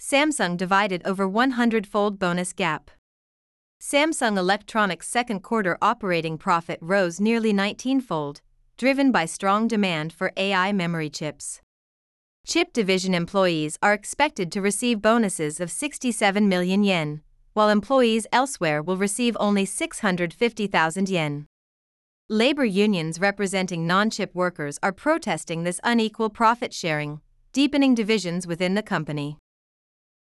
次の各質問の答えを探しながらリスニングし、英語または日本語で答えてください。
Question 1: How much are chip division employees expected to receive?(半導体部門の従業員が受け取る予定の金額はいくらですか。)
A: They are expected to receive 67 million yen.(6700万円を受け取る予定です。)

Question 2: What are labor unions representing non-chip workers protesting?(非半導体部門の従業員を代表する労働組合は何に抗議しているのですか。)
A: They are protesting this unequal profit sharing.(この不平等な利益配分に抗議しています。)

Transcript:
Samsung Divided Over 100-Fold Bonus Gap
Samsung Electronics' second-quarter operating profit rose nearly nineteenfold, driven by strong demand for AI memory chips.
Chip division employees are expected to receive bonuses of 67 million yen, while employees elsewhere will receive only 650,000 yen.
Labor unions representing non-chip workers are protesting this unequal profit sharing, deepening divisions within the company.